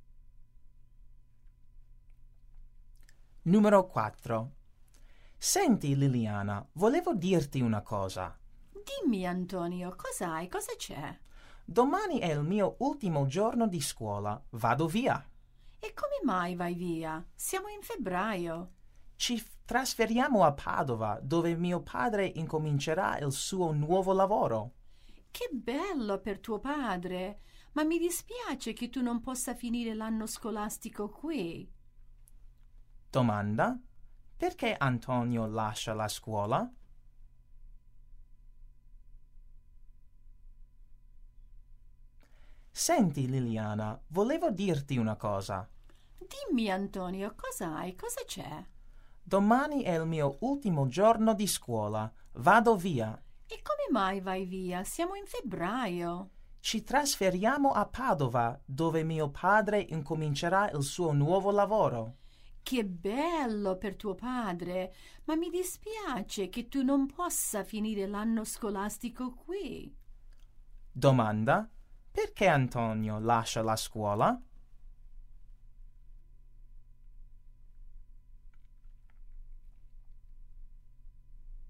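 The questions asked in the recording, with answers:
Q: perché Antonio lascia la scuola?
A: La famiglia si trasferisce a Padova per il nuovo lavoro del padre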